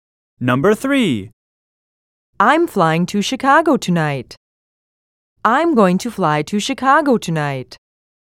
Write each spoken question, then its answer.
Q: I'm flying to Chicago tonight. I'm going to fly to Chicago tonight.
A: Same is the correct answer.